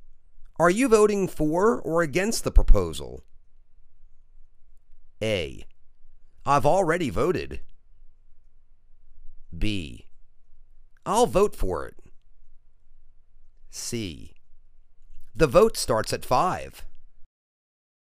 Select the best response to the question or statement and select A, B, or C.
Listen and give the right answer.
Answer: I'll vote for it.